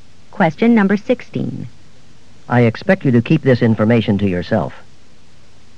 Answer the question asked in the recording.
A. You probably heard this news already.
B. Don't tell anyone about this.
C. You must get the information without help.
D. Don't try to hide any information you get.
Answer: B. Don't tell anyone about this.

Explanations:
I expect you to keep this information to yourself.